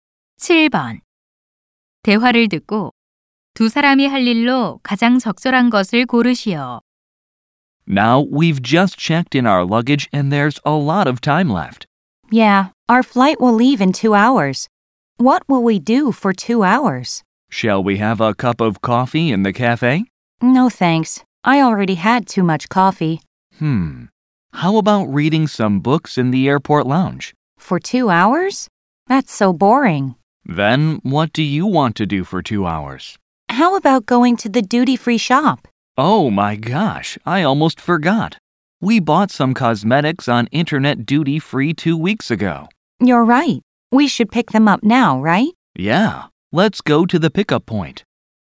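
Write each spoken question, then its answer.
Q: 대화를 듣고 두 사람이 할 일로 가장 적절한 것을 고르시오.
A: 인터넷 면세점에서 산 화장품 찾으러 가기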